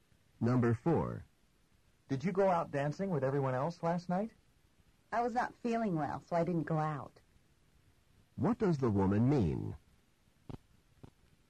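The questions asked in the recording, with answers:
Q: What does the woman mean?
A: She stayed in because she felt sick.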